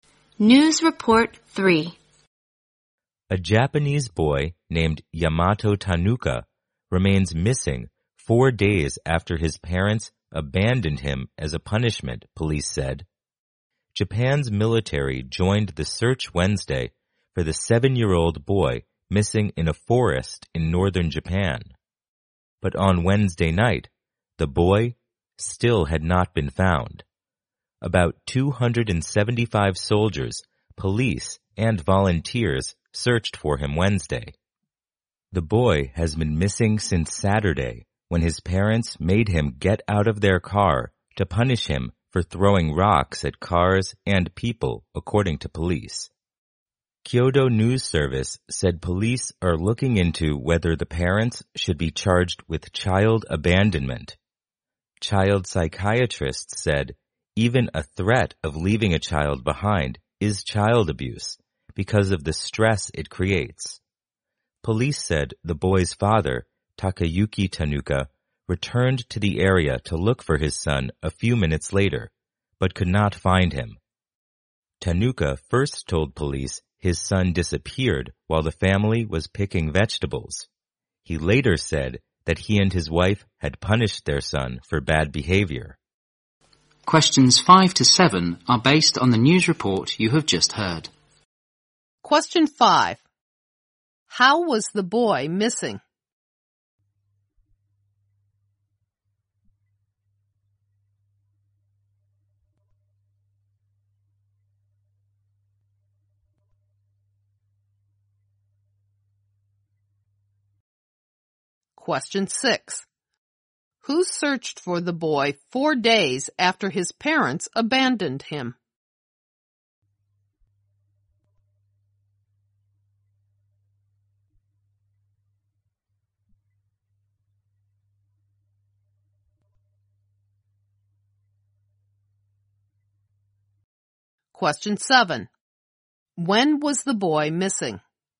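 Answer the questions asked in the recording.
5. His parents made him get out of the car as a punishment and left him.
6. About 275 soldiers, police and volunteers.
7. Since Saturday.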